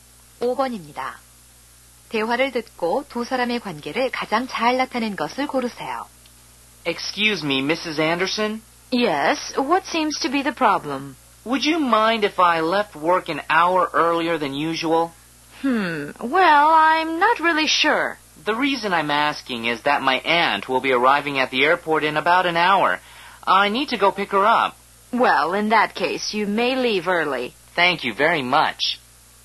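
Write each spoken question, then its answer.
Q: 대화를 듣고 두 사람의 관계를 가장 잘 나타낸 것을 고르세요.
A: 상사와 직원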